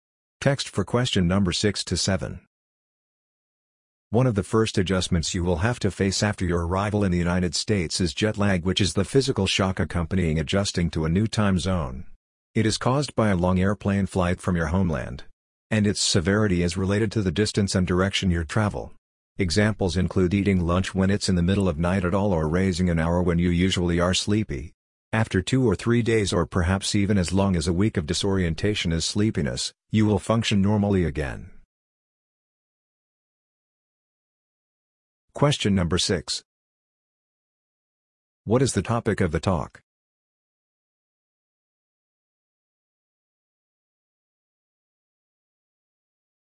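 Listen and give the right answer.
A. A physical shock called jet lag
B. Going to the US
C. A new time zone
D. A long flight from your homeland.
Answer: A. A physical shock called jet lag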